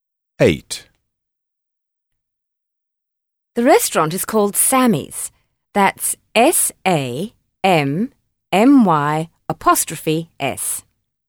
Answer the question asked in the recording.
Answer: Sammy's